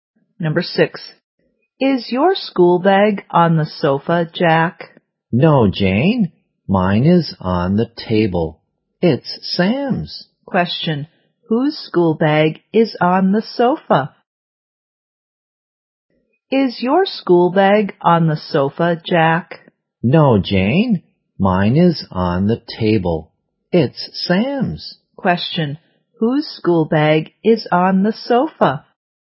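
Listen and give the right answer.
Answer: Sam's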